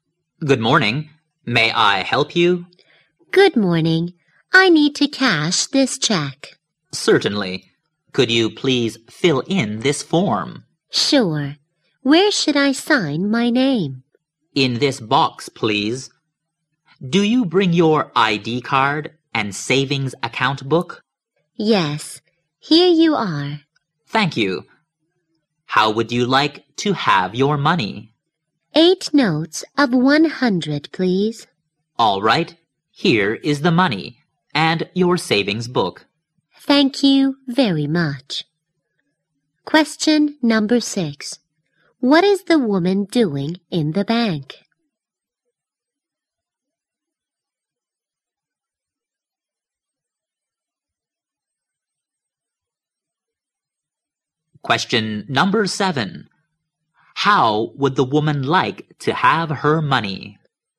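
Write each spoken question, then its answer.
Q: What is the woman doing in the bank?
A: Cashing a check

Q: How would the woman like to have her money?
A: 8 notes of 100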